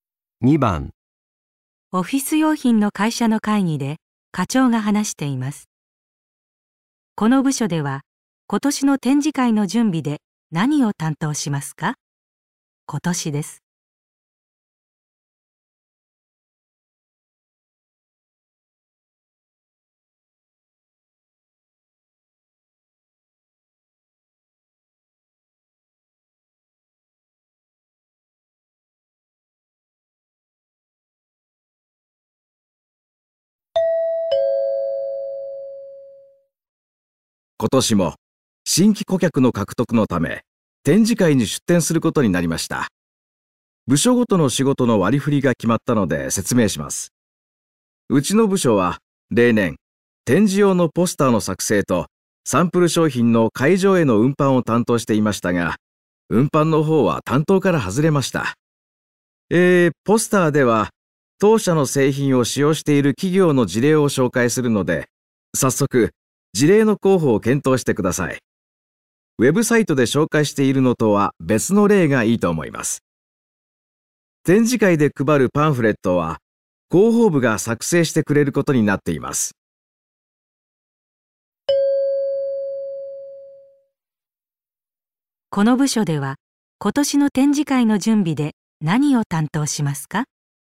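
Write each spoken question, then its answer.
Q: この部署では今年の展示会の準備で何を担当しますか?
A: 展示用のポスターの作成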